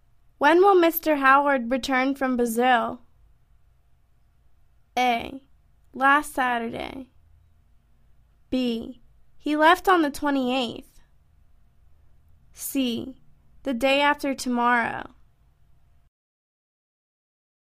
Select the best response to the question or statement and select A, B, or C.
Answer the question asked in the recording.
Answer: The day after tomorrow.